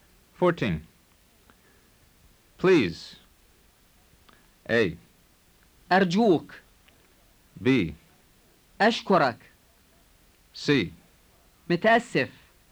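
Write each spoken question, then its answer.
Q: Please.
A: A: أرجوك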